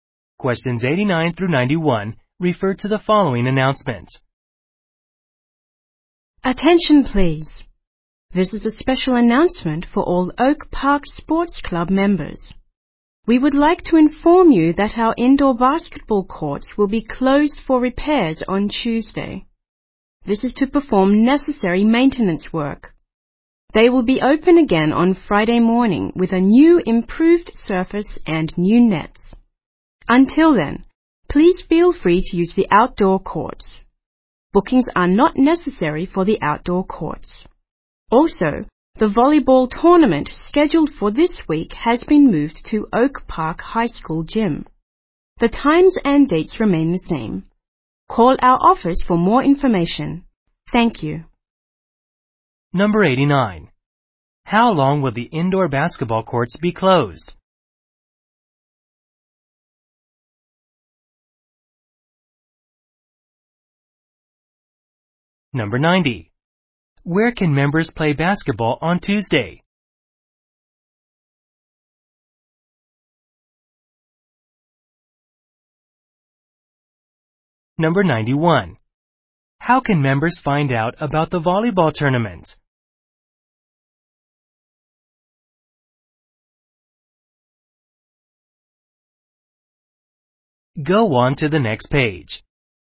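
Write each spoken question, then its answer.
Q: Where can members play basketball on Tuesday?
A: On the outdoor courts

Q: How can members find out about the volleyball tournament?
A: By calling the office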